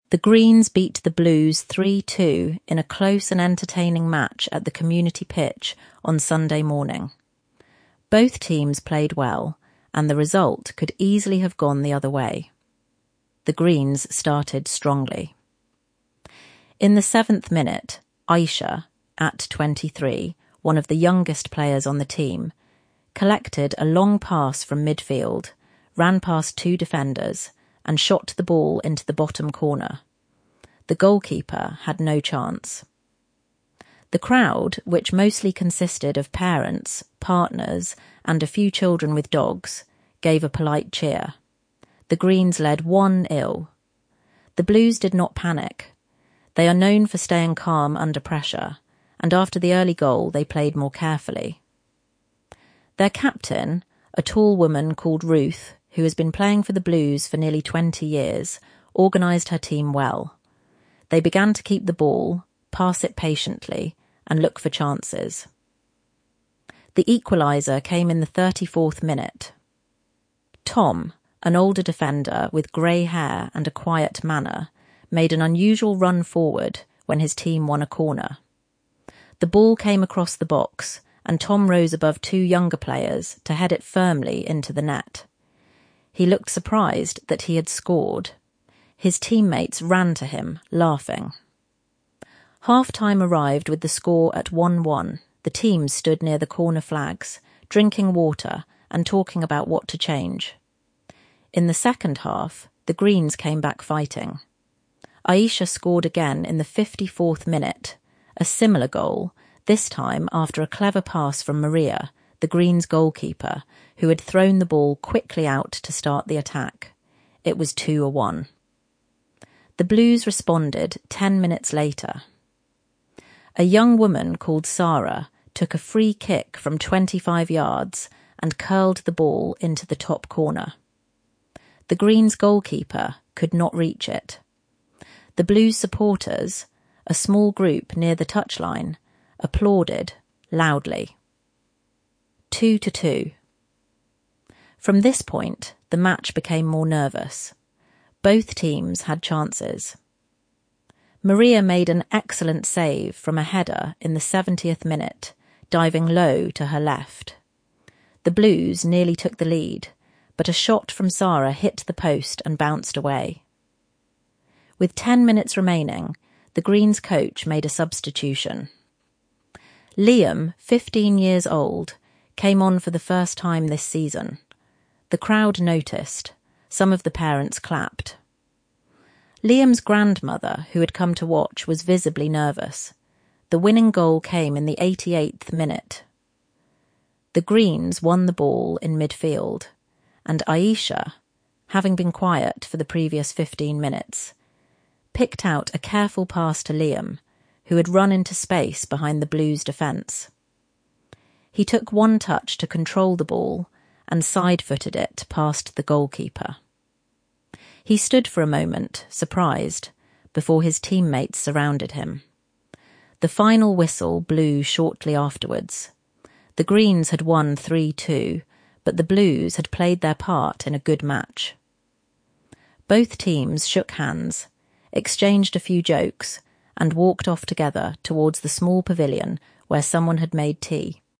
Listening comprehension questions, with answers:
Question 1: Why did the Blues not panic after going 1–0 down?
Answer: Because they are known for 'staying calm under pressure'.

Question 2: What was unusual about Tom's goal?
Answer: Defenders don't usually score

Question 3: How did Aisha set up Maria's role in the second goal?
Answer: Maria, the goalkeeper, threw the ball quickly out

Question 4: How did the Blues equalise at 2–2?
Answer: Sara, a young woman, took a free kick from twenty-five yards

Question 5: What did Maria do in the seventieth minute?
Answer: She made an excellent save from a header

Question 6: Who came on as a substitute, and what was special about it?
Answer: Liam, fifteen years old.

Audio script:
The Greens beat the Blues 3–2 in a close and entertaining match at the community pitch on Sunday morning. Both teams played well, and the result could easily have gone the other way.
The Greens started strongly. In the seventh minute, Aisha — at twenty-three, one of the youngest players on the team — collected a long pass from midfield, ran past two defenders, and shot the ball into the bottom corner. The goalkeeper had no chance. The crowd, which mostly consisted of parents, partners and a few children with dogs, gave a polite cheer. The Greens led 1–0.
The Blues did not panic. They are known for staying calm under pressure, and after the early goal they played more carefully. Their captain, a tall woman called Ruth who has been playing for the Blues for nearly twenty years, organised her team well. They began to keep the ball, pass it patiently, and look for chances.
The equaliser came in the thirty-fourth minute. Tom, an older defender with grey hair and a quiet manner, made an unusual run forward when his team won a corner. The ball came across the box, and Tom rose above two younger players to head it firmly into the net. He looked surprised that he had scored. His teammates ran to him, laughing.
Half-time arrived with the score at 1–1. The teams stood near the corner flags, drinking water and talking about what to change.
In the second half, the Greens came back fighting. Aisha scored again in the fifty-fourth minute — a similar goal, this time after a clever pass from Maria, the Greens' goalkeeper, who had thrown the ball quickly out to start the attack. It was 2–1.
The Blues responded ten minutes later. A young woman called Sara took a free kick from twenty-five yards and curled the ball into the top corner. The Greens' goalkeeper could not reach it. The Blues' supporters — a small group near the touchline — applauded loudly. 2–2.
From this point, the match became more nervous. Both teams had chances. Maria made an excellent save from a header in the seventieth minute, diving low to her left. The Blues nearly took the lead, but a shot from Sara hit the post and bounced away.
With ten minutes remaining, the Greens' coach made a substitution. Liam, fifteen years old, came on for the first time this season. The crowd noticed; some of the parents clapped. Liam's grandmother, who had come to watch, was visibly nervous.
The winning goal came in the eighty-eighth minute. The Greens won the ball in midfield, and Aisha — having been quiet for the previous fifteen minutes — picked out a careful pass to Liam, who had run into space behind the Blues' defence. He took one touch to control the ball and side-footed it past the goalkeeper. He stood for a moment, surprised, before his teammates surrounded him.
The final whistle blew shortly afterwards. The Greens had won 3–2, but the Blues had played their part in a good match. Both teams shook hands, exchanged a few jokes, and walked off together towards the small pavilion where someone had made tea.
entertaining
enjoyable to watch